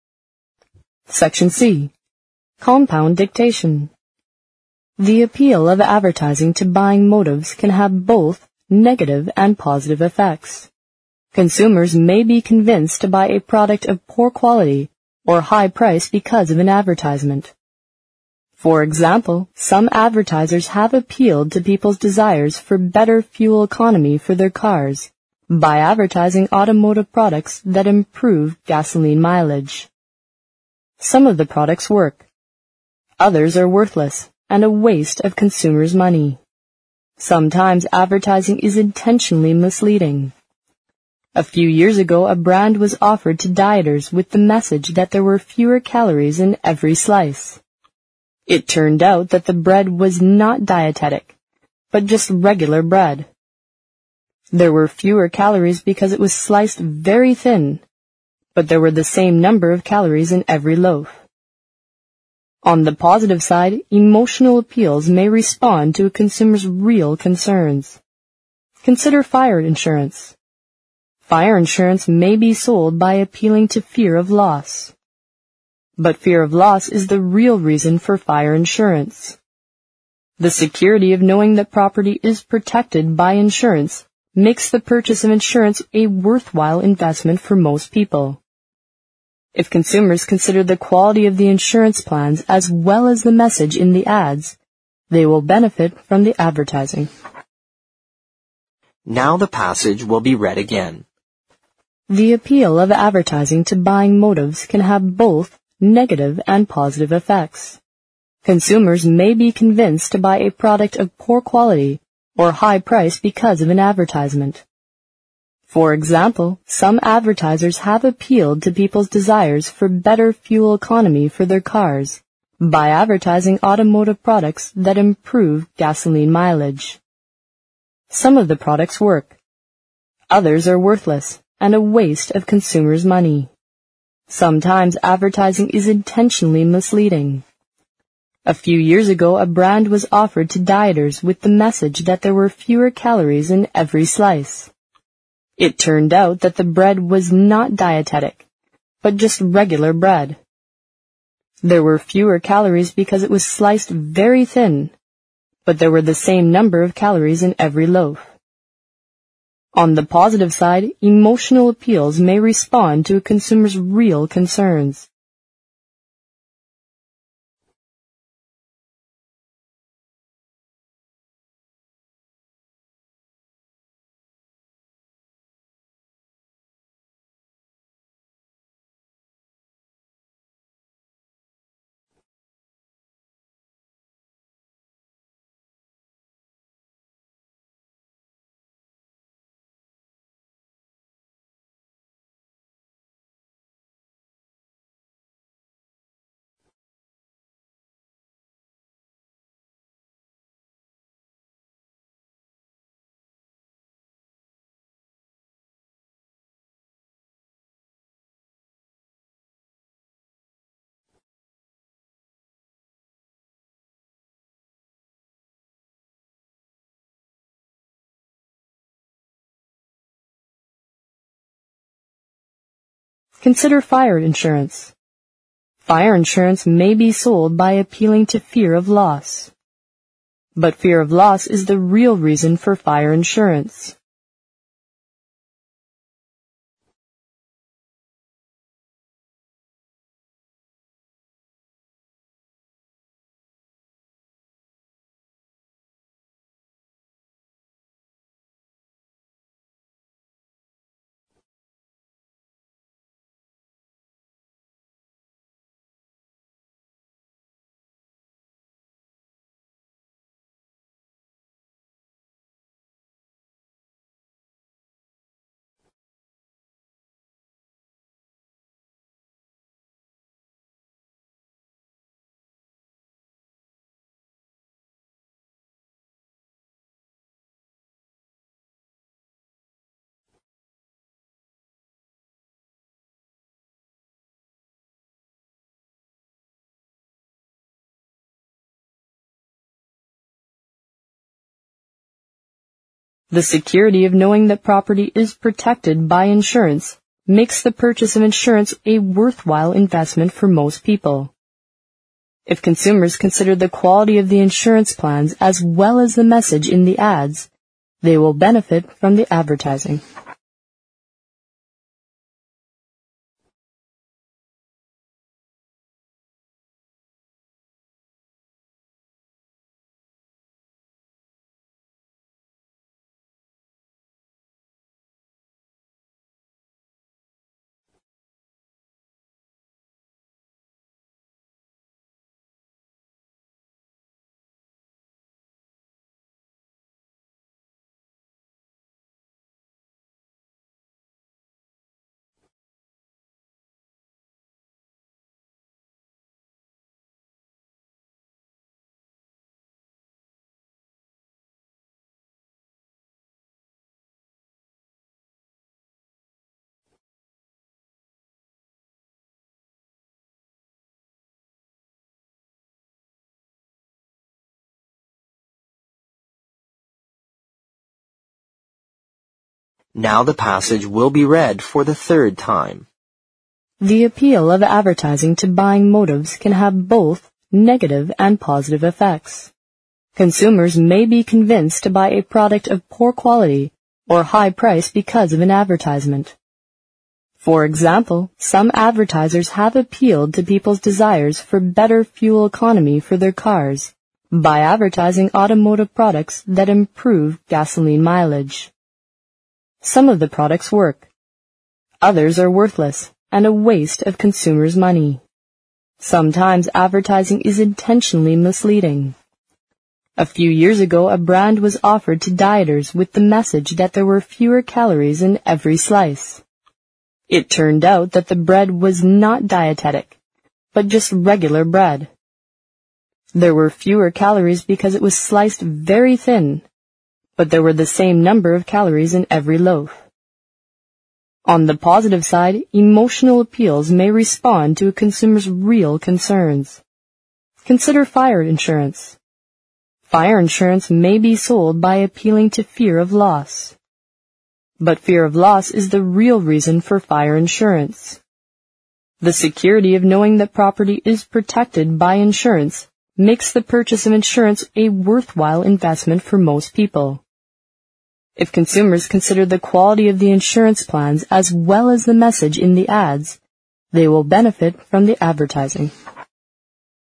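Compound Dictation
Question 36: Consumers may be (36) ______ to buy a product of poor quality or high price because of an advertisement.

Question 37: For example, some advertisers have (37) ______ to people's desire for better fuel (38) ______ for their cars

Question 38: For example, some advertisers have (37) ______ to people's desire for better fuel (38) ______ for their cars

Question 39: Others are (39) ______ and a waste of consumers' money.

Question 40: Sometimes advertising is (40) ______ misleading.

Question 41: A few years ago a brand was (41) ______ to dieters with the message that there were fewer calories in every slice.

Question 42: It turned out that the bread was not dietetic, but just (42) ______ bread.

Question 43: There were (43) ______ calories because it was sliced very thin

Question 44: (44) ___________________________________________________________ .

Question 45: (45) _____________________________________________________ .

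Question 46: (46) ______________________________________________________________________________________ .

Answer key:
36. convinced
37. appealed
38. economy
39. worthless
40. intentionally
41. offered
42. regular
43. fewer
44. On the positive side, emotional appeals may respond to a consumer's real concerns
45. But fear of loss is the real reason for fire insurance
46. If consumers consider the quality of the insurance plans as well as the message in the ads, they will benefit from the advertising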